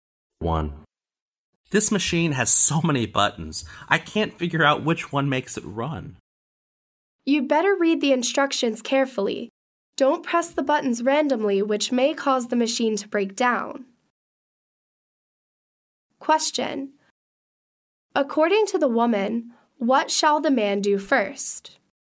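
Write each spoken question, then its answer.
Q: According to the woman, what shall the man do first?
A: Read the instructions carefully.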